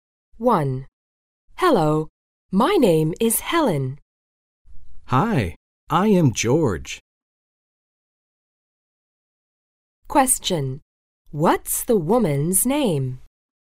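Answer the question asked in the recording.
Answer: Helen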